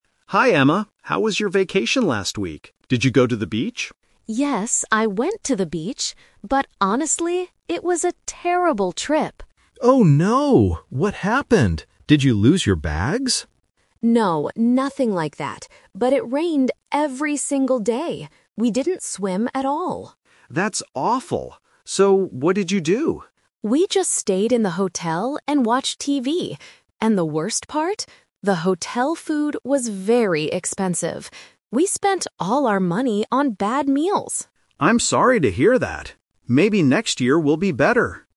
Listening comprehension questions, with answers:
Listen to a conversation between two colleagues, Tom and Emma. Choose the correct answer (A, B, or C) for each question.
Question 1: What did Emma do on her vacation?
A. She went swimming at the beach.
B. She stayed inside the hotel and watched TV.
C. She lost her bags at the airport.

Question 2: Why was Emma's trip terrible?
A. Because it rained all week.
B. Because she was very sick.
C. Because her hotel room was too small.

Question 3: What does Emma say about the hotel food?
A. It was delicious but cost a lot.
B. It was very cheap but tasted bad.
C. It was expensive and not good.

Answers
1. B. She stayed inside the hotel and watched TV.
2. A. Because it rained all week.
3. C. It was expensive and not good.

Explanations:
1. Emma says, "We just stayed in the hotel and watched TV." Option (A) is a trap because Tom mentions the beach, and Emma went there, but she explicitly says, "We didn't swim at all." Option (C) is a trap; Tom asks if she lost her bags, but she replies, "No, nothing like that."
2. Emma states the trip was terrible because "it rained every single day." Option (A) uses "all week" to paraphrase "every single day." Options (B) and (C) are plausible reasons for a bad trip in real life, but they are not mentioned in the audio.
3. Emma complains that the food was "very expensive" and refers to them as "bad meals." Option (C) matches both of these details. Option (A) is a trap because it says the food was delicious (it was bad). Option (B) is a trap because it says the food was cheap (it was expensive).

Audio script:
Tom: Hi, Emma. How was your vacation last week? Did you go to the beach?
Emma: Yes, I went to the beach, but honestly, it was a terrible trip.
Tom: Oh no! What happened? Did you lose your bags?
Emma: No, nothing like that. But it rained every single day! We didn't swim at all.
Tom: That's awful. So, what did you do?
Emma: We just stayed in the hotel and watched TV. And the worst part? The hotel food was very expensive. We spent all our money on bad meals.

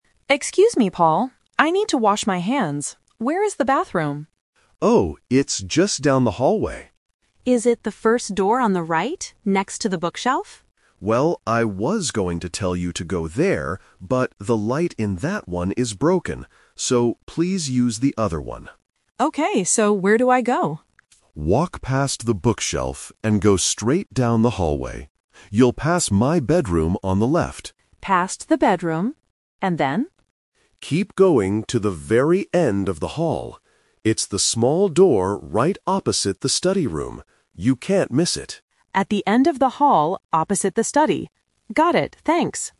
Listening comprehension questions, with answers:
Listen to the conversation between a host and a guest. Choose the correct answer (A, B, or C) for each question.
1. Why can't the guest use the first bathroom?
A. Because someone is using it.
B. Because the light is not working.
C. Because it is next to a bookshelf.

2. Which room will the guest pass on the way to the bathroom?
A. The kitchen.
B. The study room.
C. The bedroom.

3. Where is the bathroom that the guest will use?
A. At the end of the hallway.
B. Next to the bookshelf.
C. Inside the study room.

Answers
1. B. Because the light is not working.
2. C. The bedroom.
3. A. At the end of the hallway.

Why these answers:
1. The host says "the light in that one is broken." (Broken = not working). The Trap: Option (C) mentions the bookshelf, which is a real landmark in the house, but it's not the reason the guest can't use that bathroom.
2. The host gives a specific landmark: "You'll pass my bedroom on the left." The Trap: Option (B) mentions the "study room," but the guest will see it when they reach the bathroom, not while passing by.
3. The host says, "Keep going to the very end of the hall." The Trap: Option (B) was the location of the first (broken) bathroom. Option (C) uses the word "study room" to confuse the listener, but the bathroom is opposite it, not inside it.

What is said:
Guest: Excuse me, Paul? I need to wash my hands. Where is the bathroom?
Host: Oh, it's just down the hallway.
Guest: Is it the first door on the right, next to the bookshelf?
Host: Well, I was going to tell you to go there, but the light in that one is broken. So, please use the other one.
Guest: Okay, so where do I go?
Host: Walk past the bookshelf and go straight down the hallway. You'll pass my bedroom on the left.
Guest: Past the bedroom... and then?
Host: Keep going to the very end of the hall. It's the small door right opposite the study room. You can't miss it.

